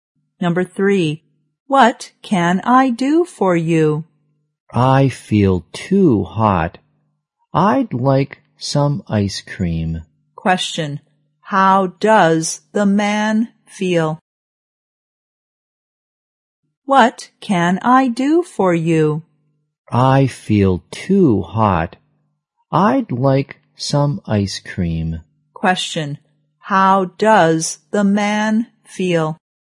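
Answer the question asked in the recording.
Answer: Too hot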